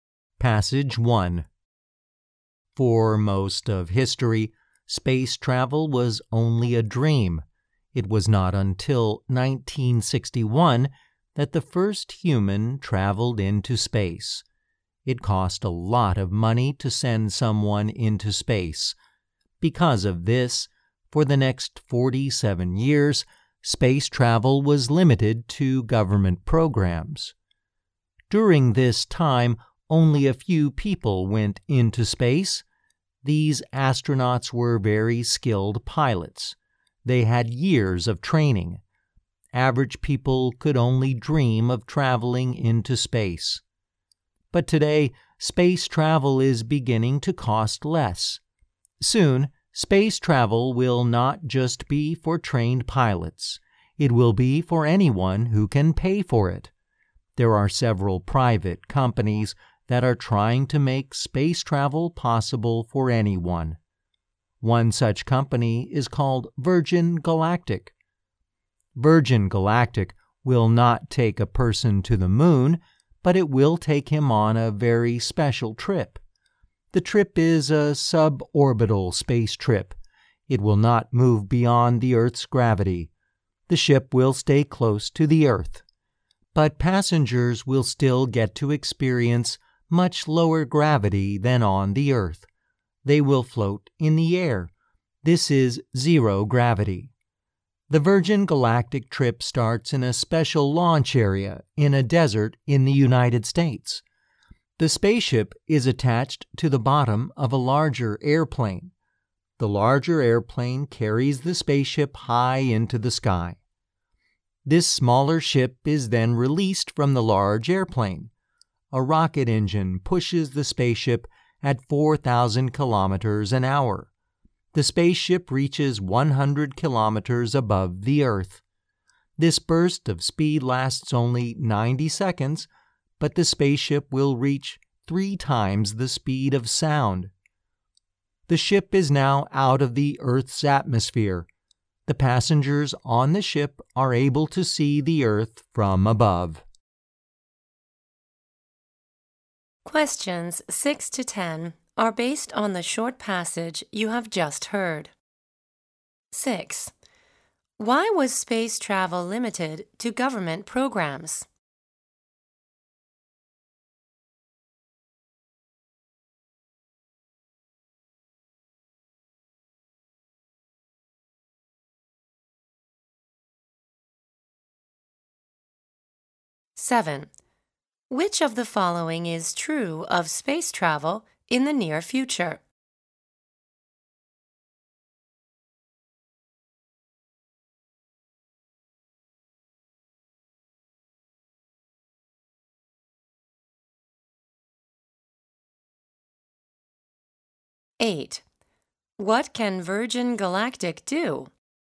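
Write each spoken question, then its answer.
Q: Why was space travel limited to government programs?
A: It cost a lot of money to send someone into space.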